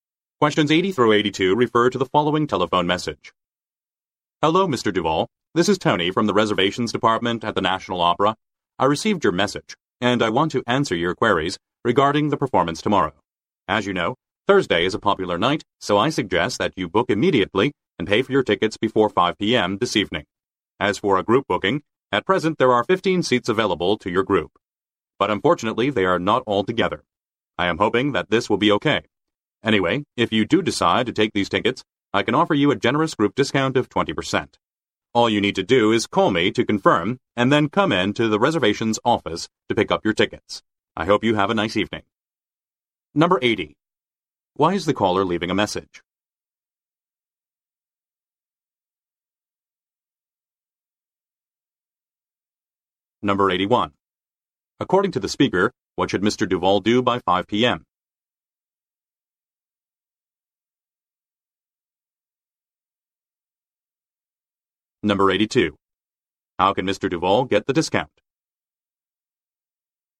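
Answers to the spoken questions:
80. To answer Mr. Duval's questions about the performance
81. Book and pay for the tickets
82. By booking as a group (taking the 15 seats)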